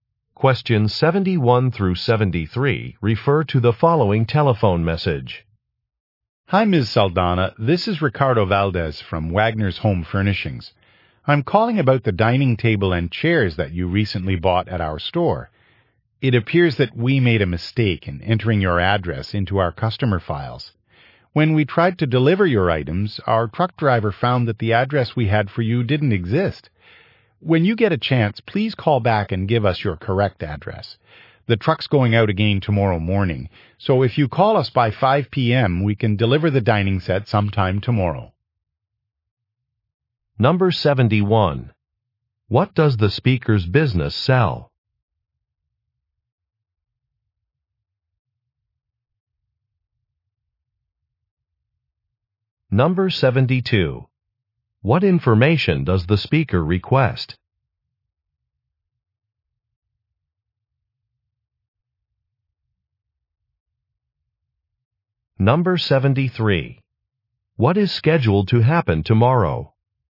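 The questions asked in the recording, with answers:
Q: What does the speaker's business sell?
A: Home furnishings (furniture)

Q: What information does the speaker request?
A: The listener's correct address

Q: What is scheduled to happen tomorrow?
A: A delivery truck will go out (the dining set can be delivered)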